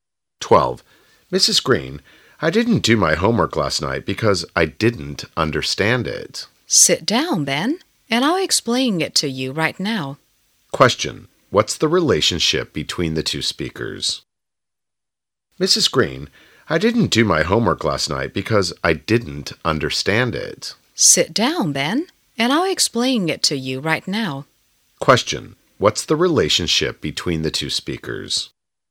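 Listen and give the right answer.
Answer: Teacher and student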